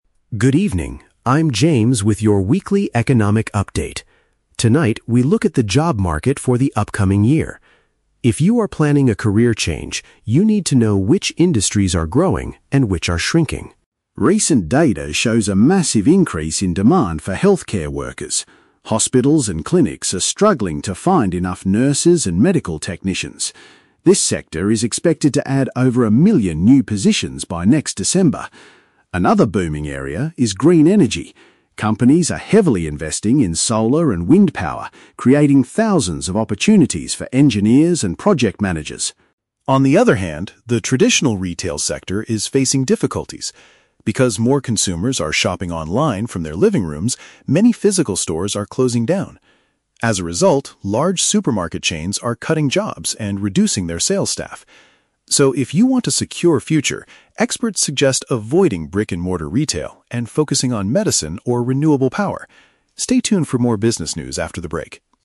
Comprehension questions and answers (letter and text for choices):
Listen to a news reporter talking about the job market and choose the correct answer (A, B, or C) for each question.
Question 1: What is the main topic of the news report?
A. How to successfully open an online business.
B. Changes and trends in employment opportunities.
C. The rising cost of medical care in local hospitals.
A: B. Changes and trends in employment opportunities.

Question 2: According to the reporter, which field is experiencing a shortage of workers?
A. Medical and health services.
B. Traditional supermarket chains.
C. Computer software development.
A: A. Medical and health services.

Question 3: Why are jobs in the traditional retail sector decreasing?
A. Because large companies are investing their money in green energy.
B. Because people increasingly prefer buying things on the internet.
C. Because physical stores cannot find enough sales staff to hire.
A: B. Because people increasingly prefer buying things on the internet.

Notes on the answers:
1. James states that they are looking at "the job market for the upcoming year" and discussing "which industries are growing and which are shrinking". Option (B) correctly summarizes this as changes and trends in employment. Option (A) is The Trap: The audio mentions "shopping online", but it does not teach how to open an online business. Option (C) is The Trap: "Hospitals" are mentioned, but the topic is about their need for workers, not the cost of medical care.
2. The reporter mentions a "massive increase in demand for healthcare workers" and says hospitals are "struggling to find enough nurses". Option (A) correctly identifies this field. Option (B) is The Trap: Supermarket chains are mentioned, but they are "cutting jobs" (reducing staff), not experiencing a shortage of workers. Option (C) is never mentioned.
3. James explains that the retail sector is facing difficulties "Because more consumers are shopping online from their living rooms". Option (B) perfectly paraphrases this reason (shopping online = buying things on the internet). Option (A) is The Trap: Green energy is mentioned as a growing industry, not the reason retail is failing. Option (C) is the opposite of reality; they are "cutting jobs", not struggling to find staff.

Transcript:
James: Good evening, I'm James with your weekly economic update. Tonight, we look at the job market for the upcoming year. If you are planning a career change, you need to know which industries are growing and which are shrinking.
Recent data shows a massive increase in demand for healthcare workers. Hospitals and clinics are struggling to find enough nurses and medical technicians. This sector is expected to add over a million new positions by next December. Another booming area is green energy. Companies are heavily investing in solar and wind power, creating thousands of opportunities for engineers and project managers.
On the other hand, the traditional retail sector is facing difficulties. Because more consumers are shopping online from their living rooms, many physical stores are closing down. As a result, large supermarket chains are cutting jobs and reducing their sales staff. So, if you want a secure future, experts suggest avoiding brick-and-mortar retail and focusing on medicine or renewable power. Stay tuned for more business news after the break.